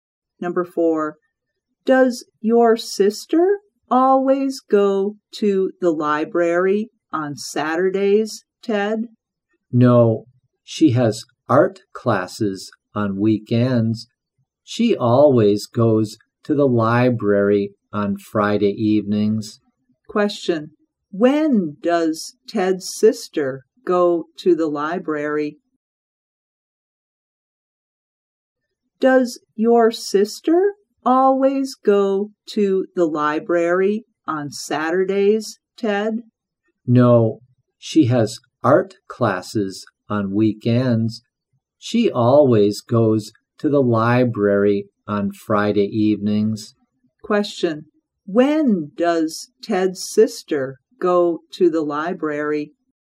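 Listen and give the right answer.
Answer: on Friday evenings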